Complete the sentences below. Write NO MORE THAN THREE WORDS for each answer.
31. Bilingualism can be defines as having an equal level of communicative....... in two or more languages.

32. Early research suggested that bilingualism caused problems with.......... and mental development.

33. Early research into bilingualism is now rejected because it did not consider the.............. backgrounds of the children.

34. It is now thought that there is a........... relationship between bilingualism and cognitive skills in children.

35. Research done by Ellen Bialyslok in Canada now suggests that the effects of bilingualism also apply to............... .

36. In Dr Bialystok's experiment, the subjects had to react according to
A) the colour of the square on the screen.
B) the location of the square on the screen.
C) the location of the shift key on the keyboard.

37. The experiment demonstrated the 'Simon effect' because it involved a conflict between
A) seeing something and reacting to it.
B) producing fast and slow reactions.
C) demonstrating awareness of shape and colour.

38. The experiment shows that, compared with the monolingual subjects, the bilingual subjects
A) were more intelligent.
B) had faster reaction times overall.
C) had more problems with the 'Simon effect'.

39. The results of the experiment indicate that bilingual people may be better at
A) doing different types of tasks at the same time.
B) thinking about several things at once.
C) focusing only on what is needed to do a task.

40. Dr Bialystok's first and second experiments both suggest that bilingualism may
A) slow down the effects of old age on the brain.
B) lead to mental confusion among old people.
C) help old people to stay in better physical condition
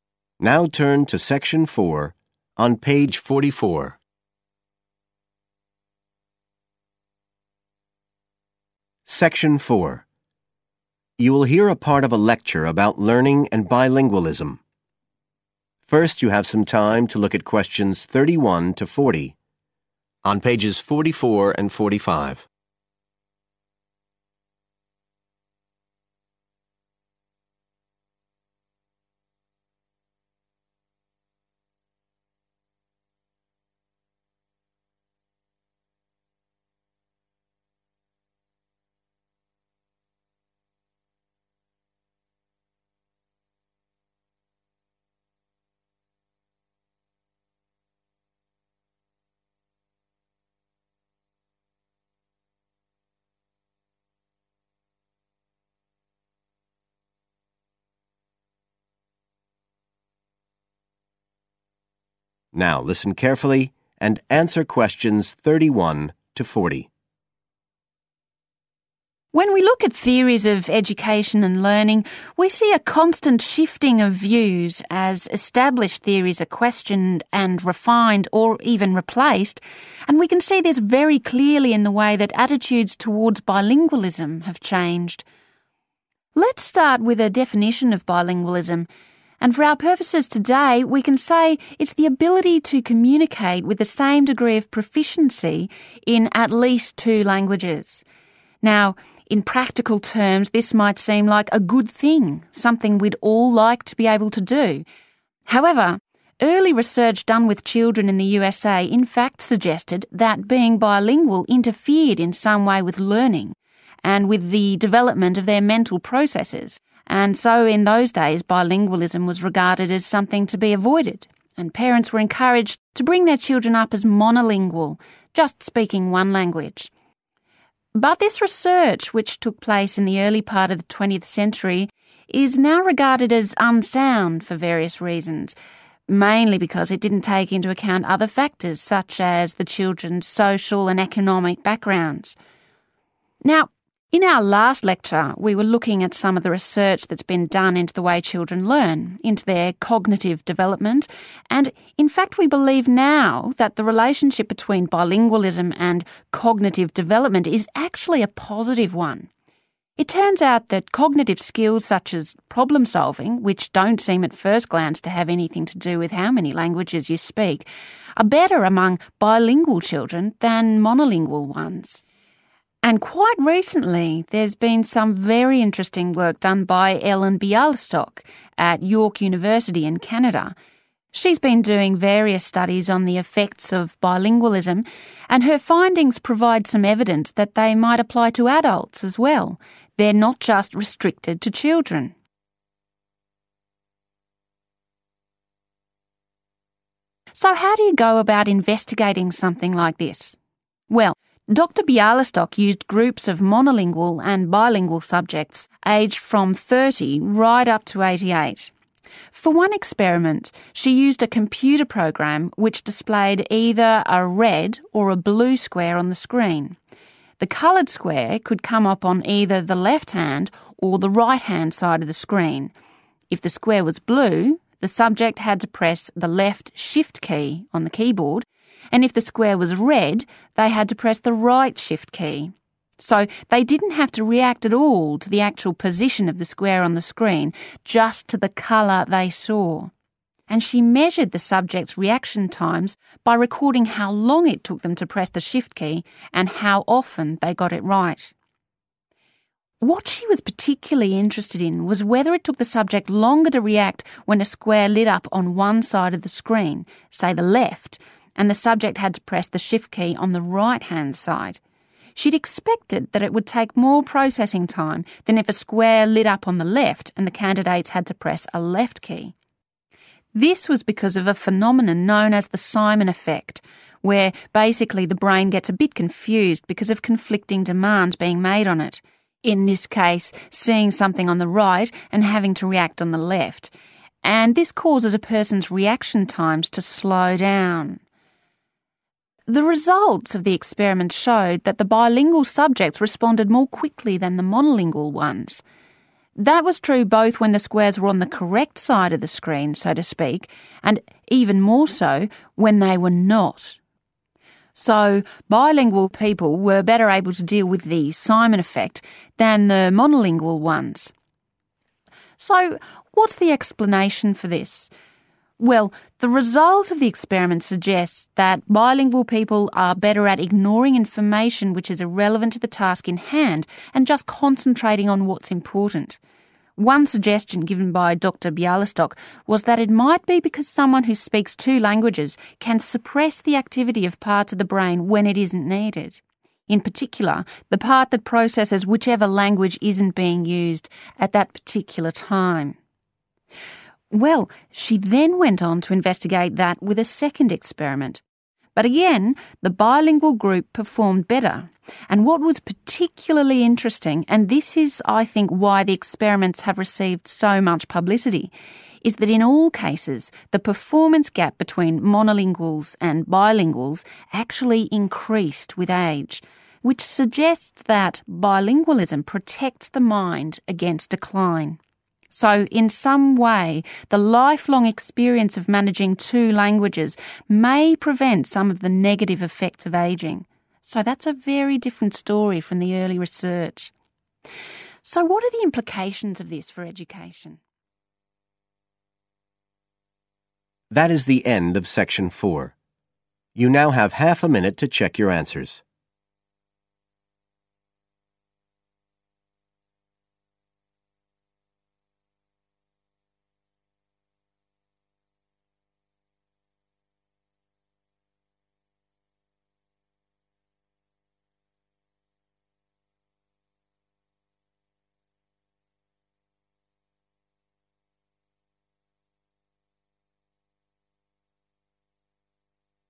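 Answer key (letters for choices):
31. proficiency
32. learning
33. social and economic
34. positive
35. adults
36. A
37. A
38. B
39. C
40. A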